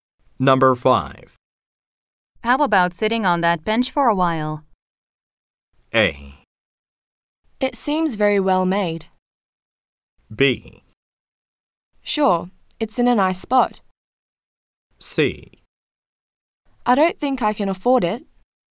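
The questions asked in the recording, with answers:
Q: How about sitting on that bench for a while?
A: B: Sure, it's in a nice spot.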